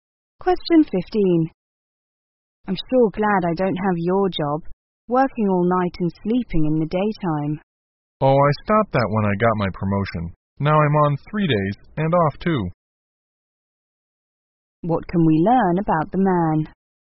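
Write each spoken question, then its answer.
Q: What can we learn about the man?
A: He no longer works nights since his promotion.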